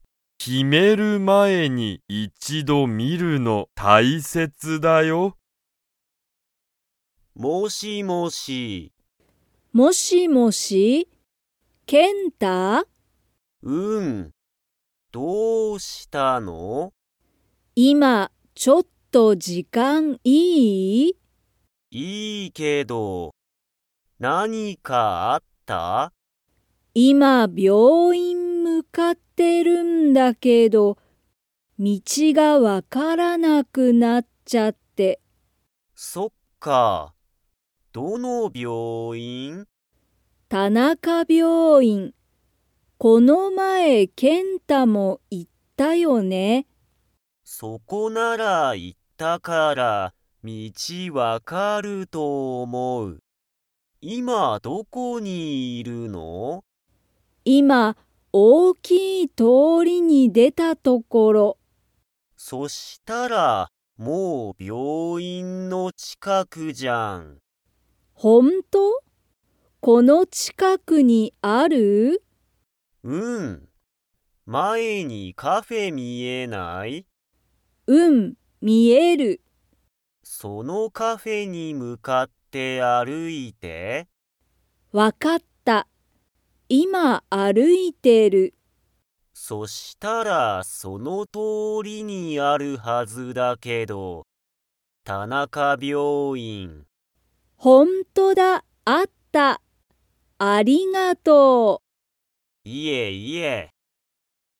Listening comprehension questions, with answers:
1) ケンタは、この前(まえ)タナカ病院(びょういん)に行(い)きましたか?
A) はい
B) いいえ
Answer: A) はい

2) サキは、今いま、大おおきい____に出でたところだ。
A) 通(とお)り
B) 時間じかん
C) )病院びょういん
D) 大学(だいがく)())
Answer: A) 通(とお)り

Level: Level 2

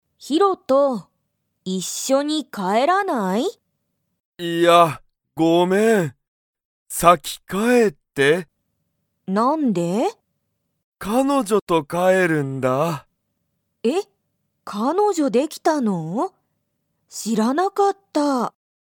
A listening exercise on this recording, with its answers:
ユウコとヒロトは、一緒いっしょに帰かえりますか?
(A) はい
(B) いいえ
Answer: (B) いいえ

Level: Level 1

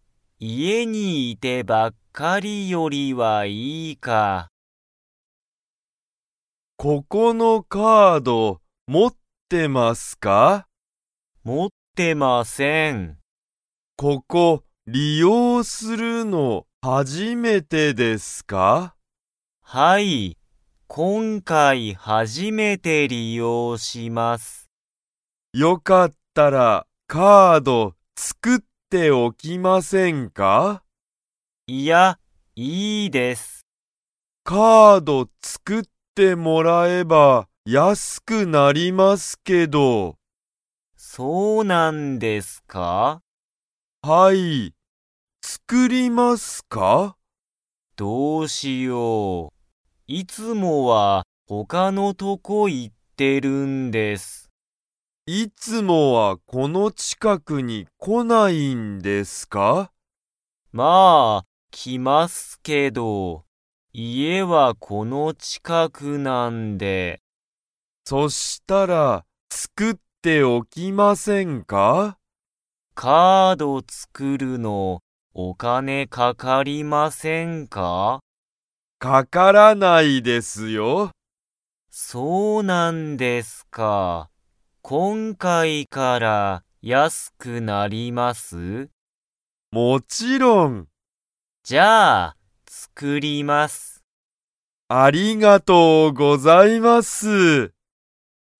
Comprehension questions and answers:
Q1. ユタカは、ここのカードを持(も)ってますか?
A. はい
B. いいえ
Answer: B. いいえ

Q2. カード作(つく)れば、____安(やす)くなる。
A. 明日(あした)だけ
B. 昨日きのうだったら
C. この近(ちか)くで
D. 今回(こんかい)から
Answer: D. 今回(こんかい)から

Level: Level 2

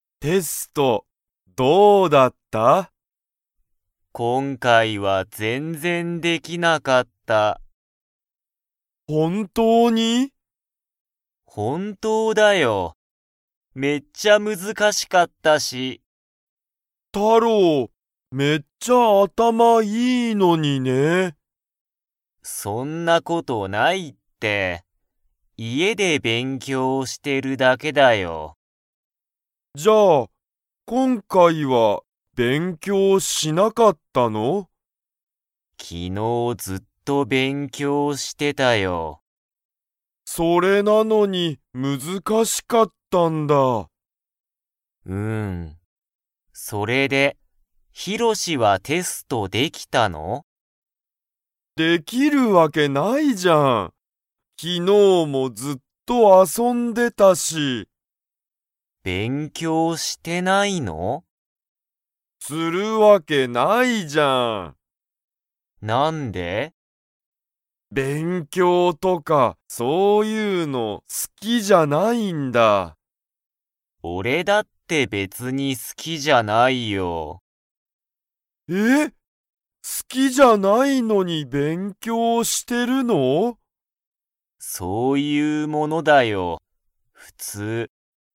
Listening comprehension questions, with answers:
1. タロウは、昨日(きのう)ずっと____。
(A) 寝(ね)てた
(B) 遊(あそ)んでた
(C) 勉強(べんきょう)してた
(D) 食(た)べてた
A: (C) 勉強(べんきょう)してた

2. ヒロシは、テストができましたか?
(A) はい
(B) いいえ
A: (B) いいえ

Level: Level 2

